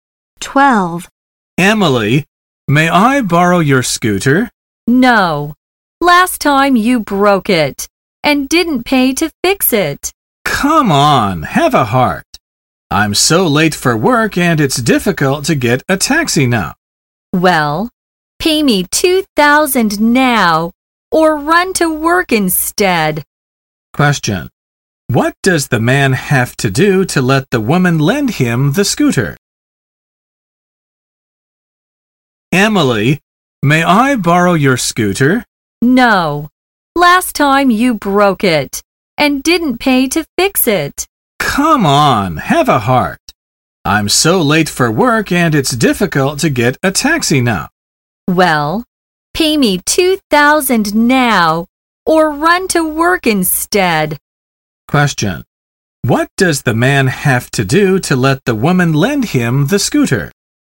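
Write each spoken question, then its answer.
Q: What does the man have to do to let the woman lend him the scooter?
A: Pay her $2,000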